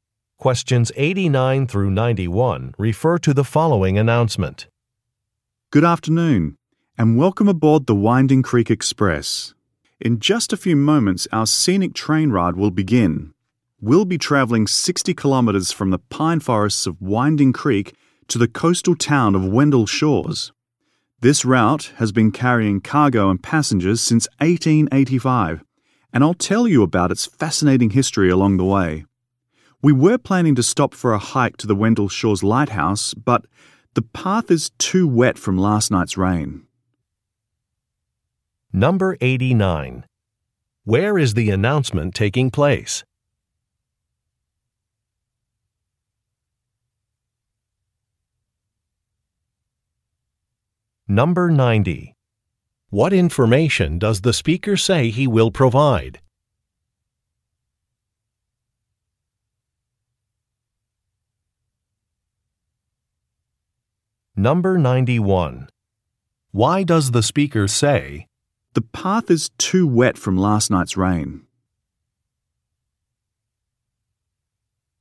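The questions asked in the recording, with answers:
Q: Where is the announcement taking place?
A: On a train

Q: What information does the speaker say he will provide?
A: The history of the route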